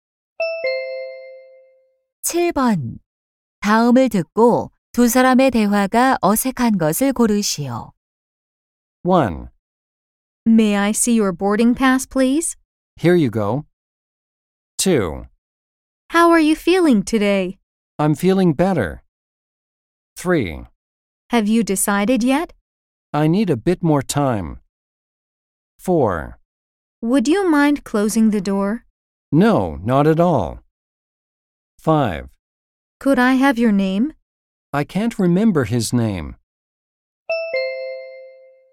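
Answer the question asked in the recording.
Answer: 5: Could I have your name? / I can't remember his name.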